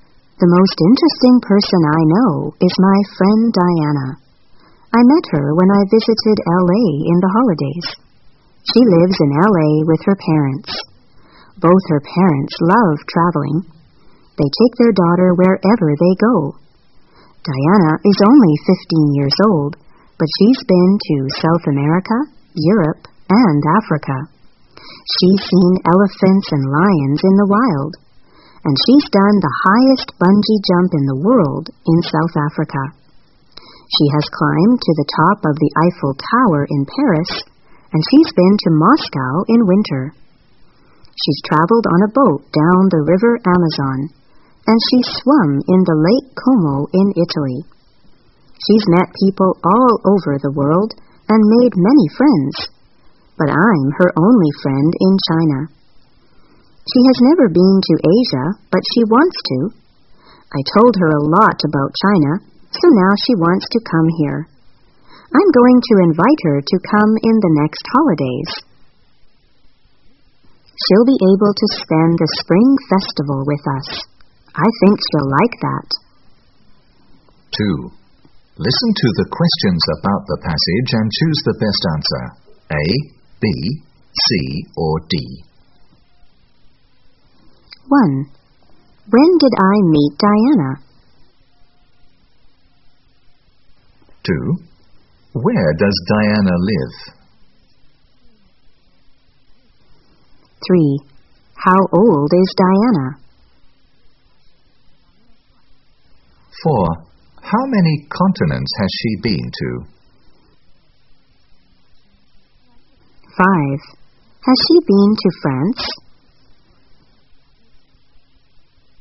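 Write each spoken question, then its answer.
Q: When did I meet Diana?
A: In the holidays, when I visited L.A.

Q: Where does Diana live?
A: In L.A. with her parents

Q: How old is Diana?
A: 15 years old

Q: Has she been to France?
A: Yes, she has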